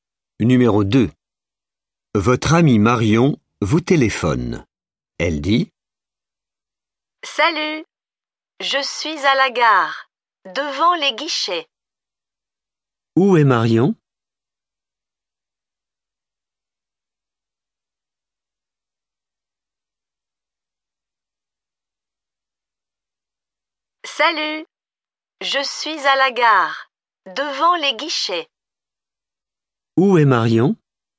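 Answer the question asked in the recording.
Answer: À la gare, devant les guichets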